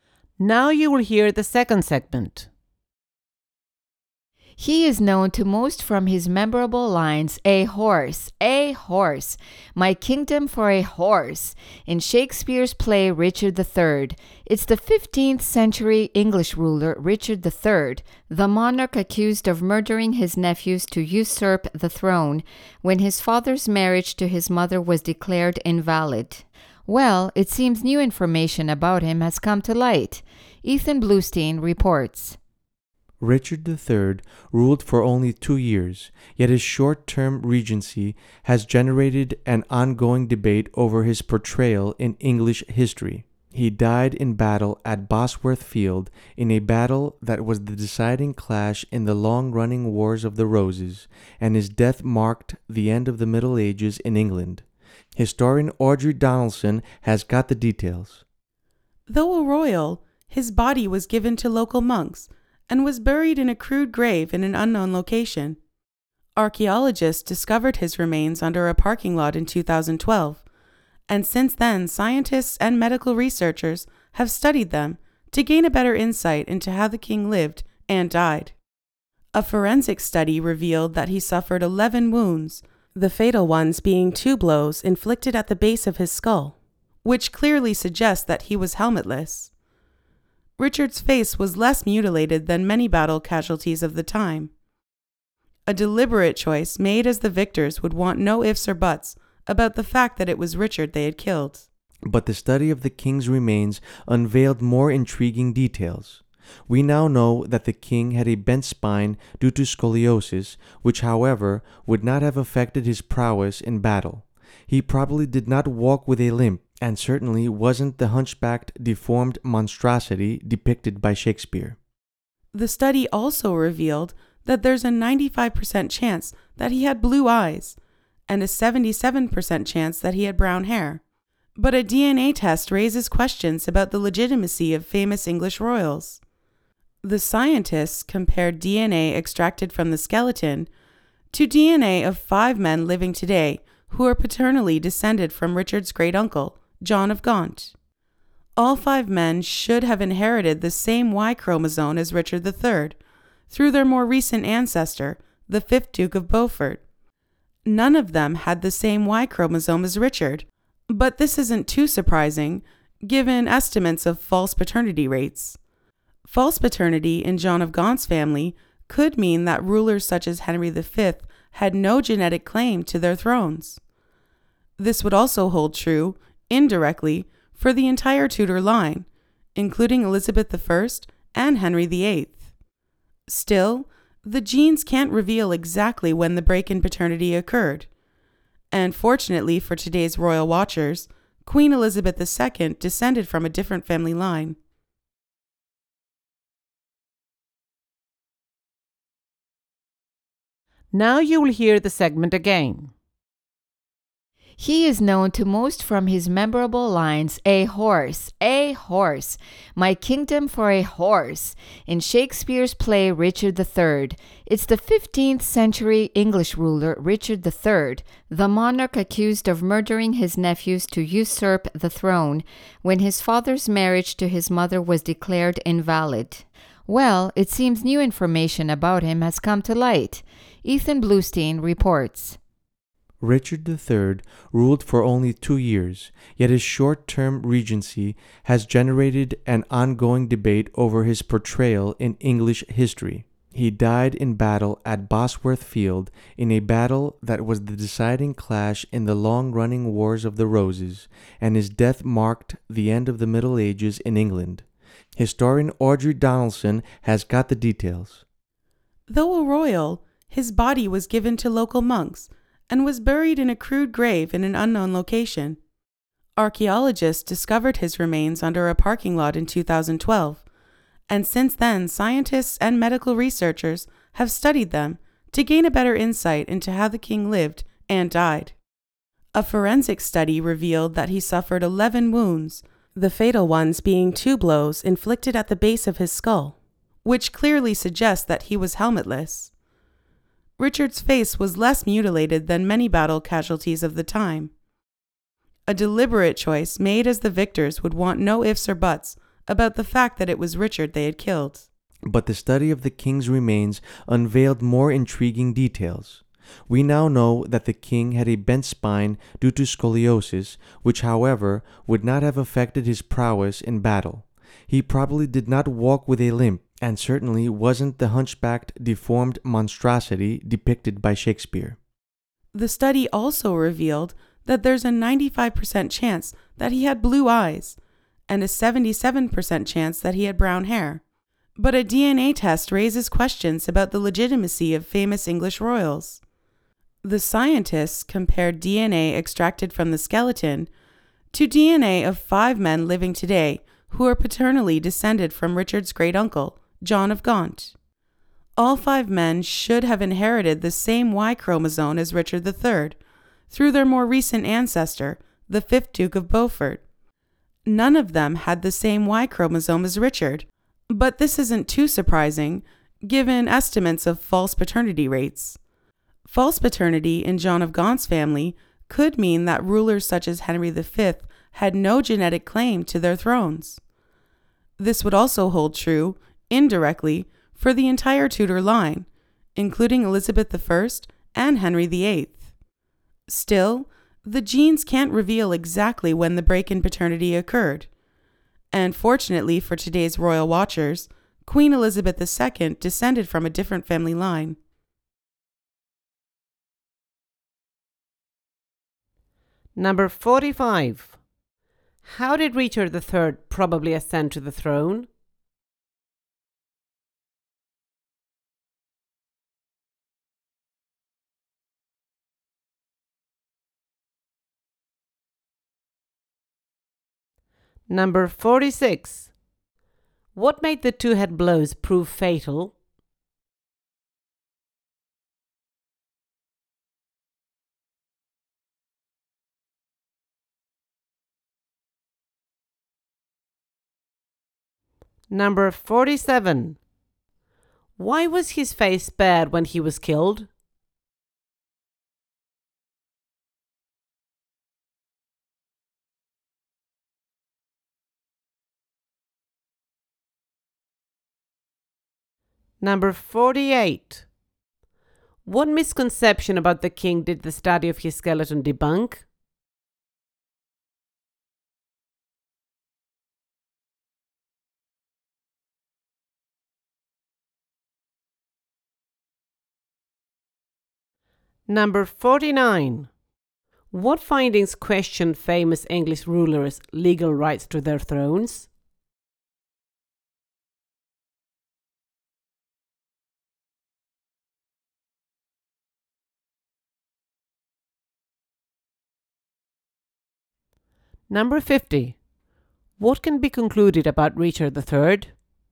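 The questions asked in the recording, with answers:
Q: How did Richard III probably ascend to the throne?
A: By usurping it, allegedly murdering his nephews

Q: What made the two-head blows prove fatal?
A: He was not wearing a helmet

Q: Why was his face spared when he was killed?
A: So there would be no doubt that it was Richard who had been killed

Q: What misconception about the king did the study of his skeleton debunk?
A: That he was a hunchbacked, deformed monstrosity who limped

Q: What findings question famous English rulers' legal rights to their thrones?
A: DNA evidence of false paternity in John of Gaunt's family line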